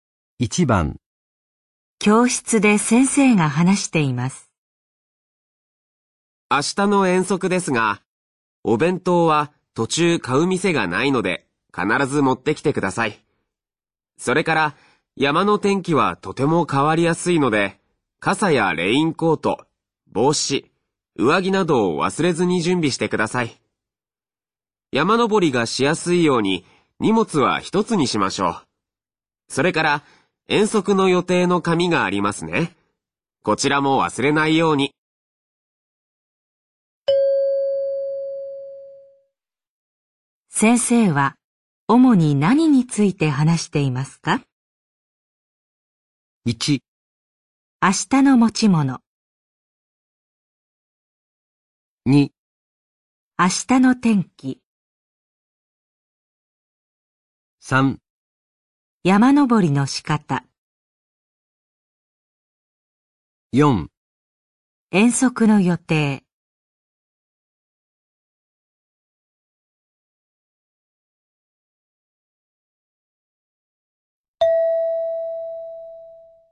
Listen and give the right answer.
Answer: 1

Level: N3 Listening · Test 9